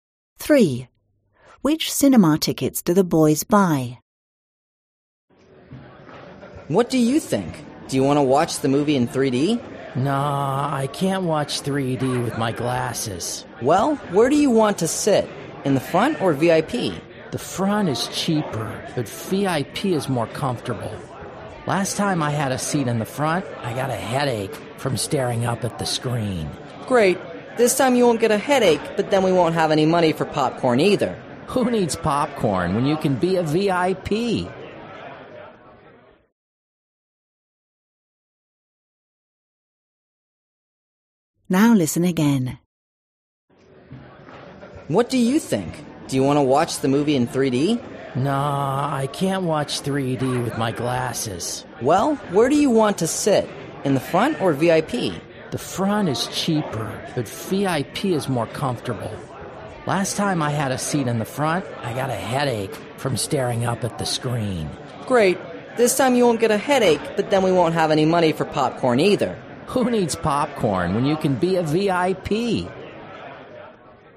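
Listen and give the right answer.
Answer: VIP seats, not 3D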